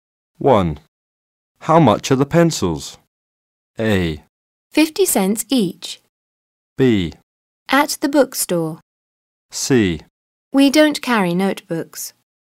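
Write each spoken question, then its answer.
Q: How much are the pencils?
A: A: 50 cents each.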